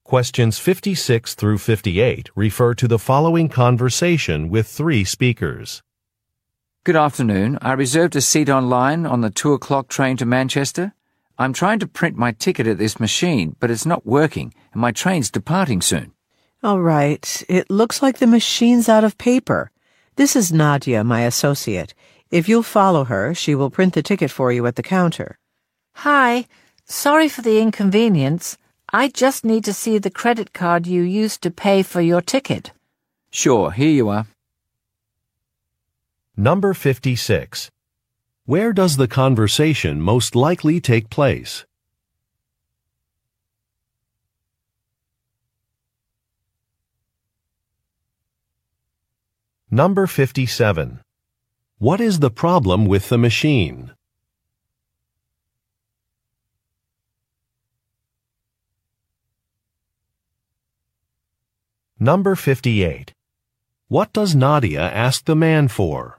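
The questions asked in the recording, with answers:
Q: Where does the conversation most likely take place?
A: At a train station

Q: What is the problem with the machine?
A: It is out of paper

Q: What does Nadia ask the man for?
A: The credit card he used to pay for his ticket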